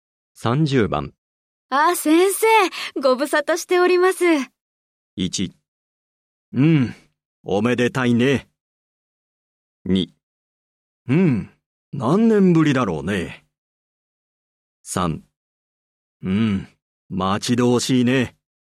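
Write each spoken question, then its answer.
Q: あ、先生、ご無沙汰しております。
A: 2: うん、何年ぶりだろうね。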